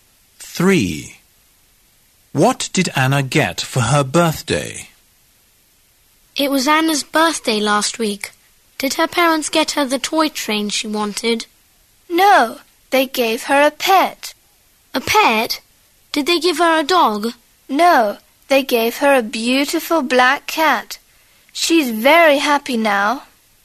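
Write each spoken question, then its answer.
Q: What did Anna get for her birthday?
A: a black cat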